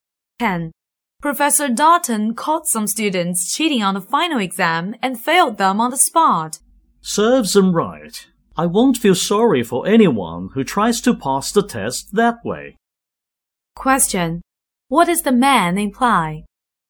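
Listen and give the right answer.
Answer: The cheating students deserved to fail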